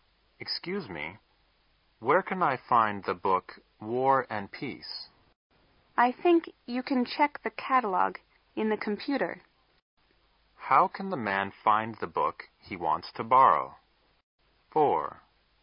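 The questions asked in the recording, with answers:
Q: How can the man find the book he wants to borrow?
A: By checking the catalog in the computer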